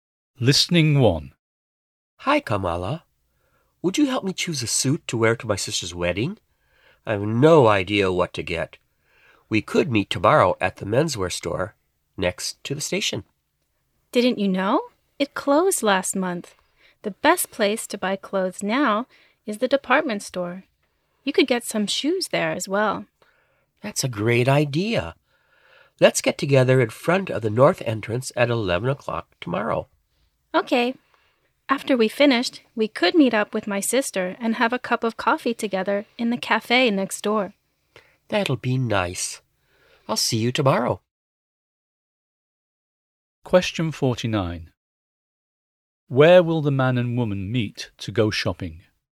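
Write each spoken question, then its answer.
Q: Where will the man and woman meet to go shopping?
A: In front of the north entrance of the department store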